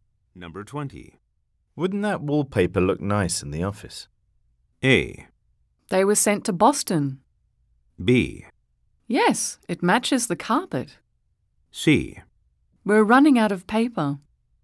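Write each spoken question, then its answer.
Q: Wouldn't that wallpaper look nice in the office?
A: B: Yes, it matches the carpet.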